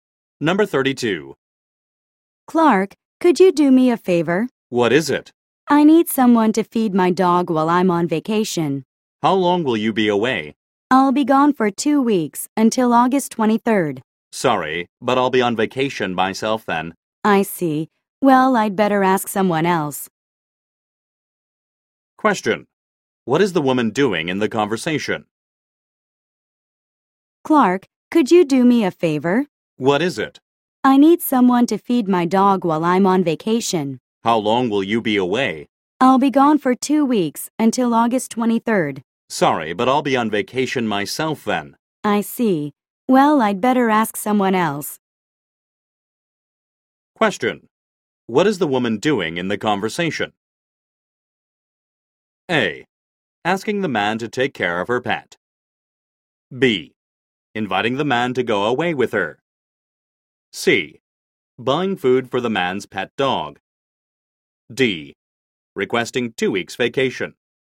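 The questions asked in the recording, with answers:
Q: What is the woman doing in the conversation?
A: A: Asking the man to take care of her pet.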